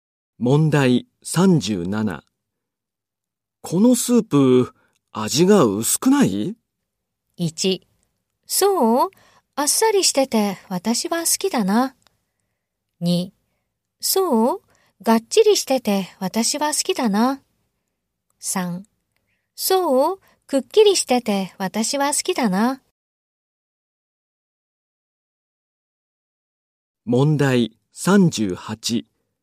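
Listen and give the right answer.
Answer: 1: そう?あっさりしてて私は好きだな。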